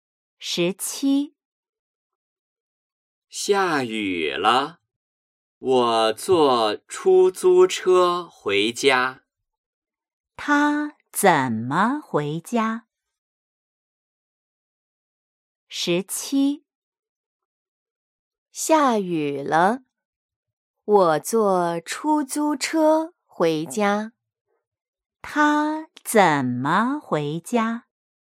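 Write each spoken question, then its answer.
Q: 他怎么回家?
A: 坐出租车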